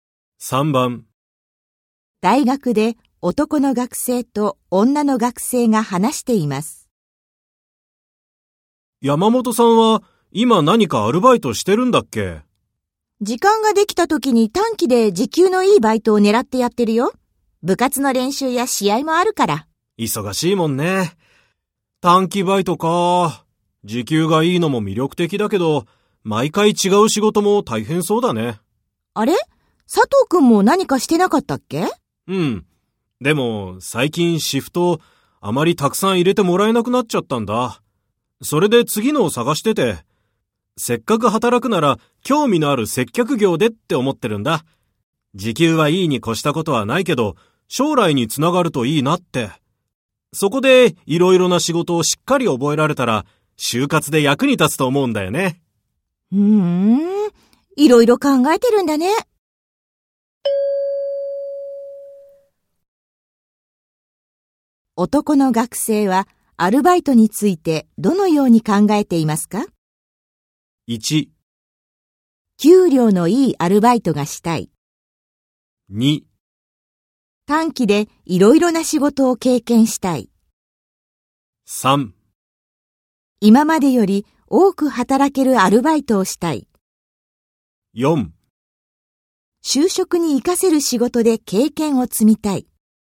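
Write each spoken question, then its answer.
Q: 男の学生はアルバイトについてどのように考えていますか?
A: 4: 就職に活かせる仕事で経験を積みたい。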